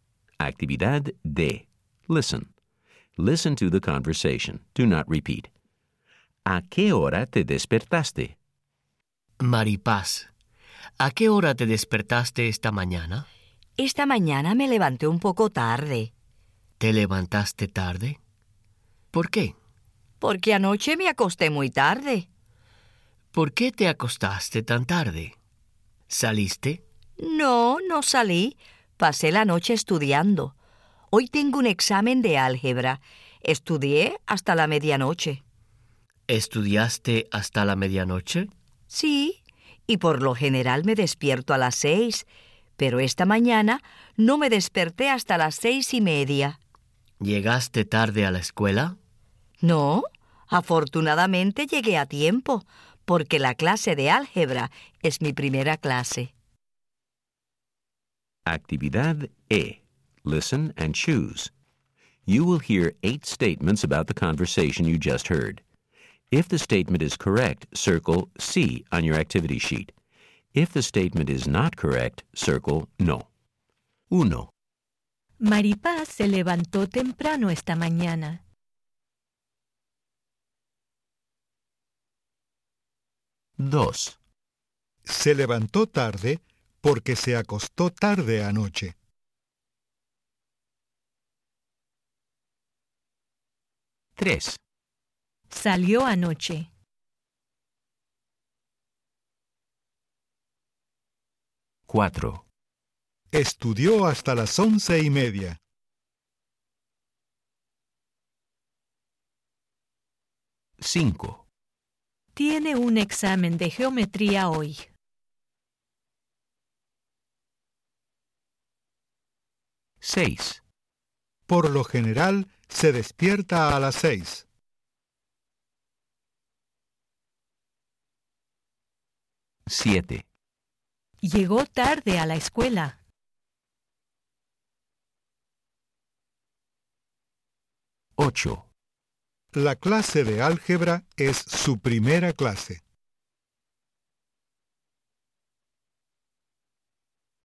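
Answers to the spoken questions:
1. No
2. Sí
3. No
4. No
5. No
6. Sí
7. No
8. Sí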